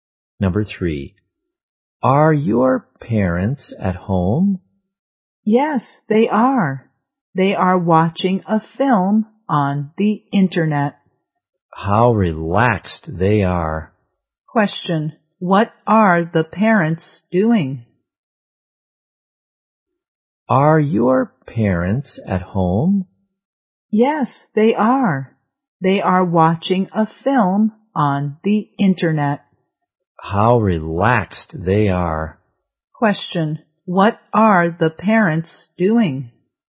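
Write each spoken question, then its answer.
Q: what are the parents doing?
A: Watching a film on the internet.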